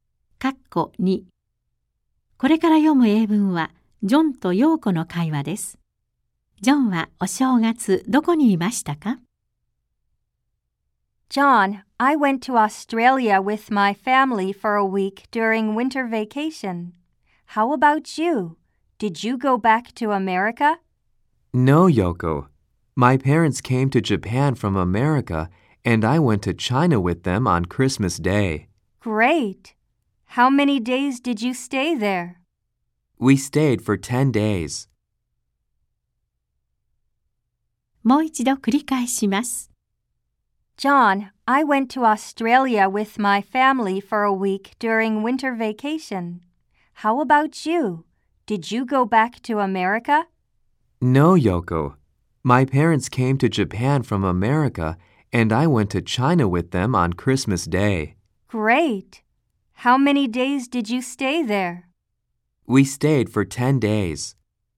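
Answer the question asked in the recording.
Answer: 中国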